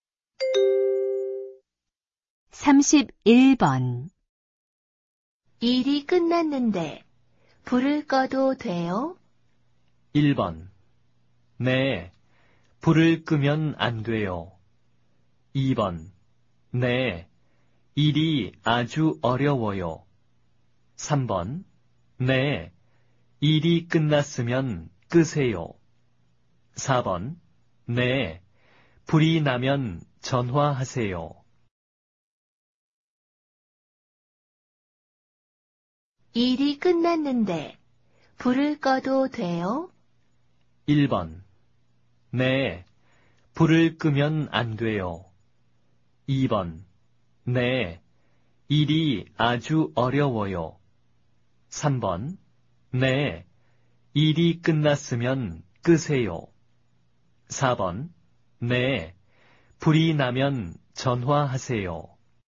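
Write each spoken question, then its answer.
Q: 일이 끝났는데 불을 꺼도 돼요?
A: 3: 네, 일이 끝났으면 끄세요.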